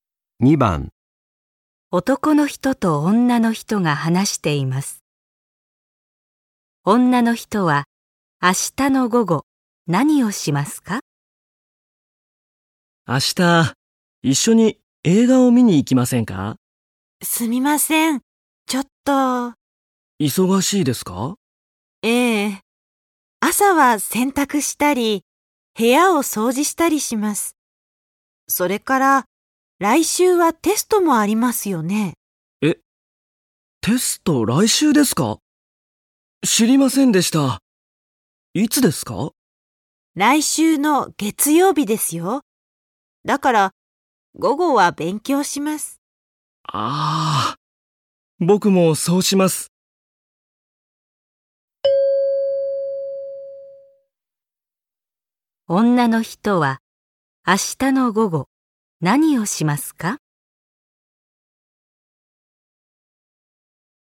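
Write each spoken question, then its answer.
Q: 女の人は明日の午後何をしますか?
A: 勉強します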